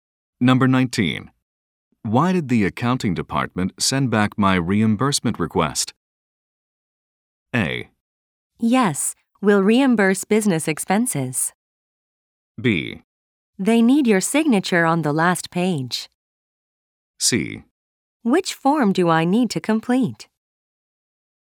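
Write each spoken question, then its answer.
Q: Why did the accounting department send back my reimbursement request?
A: B: They need your signature on the last page.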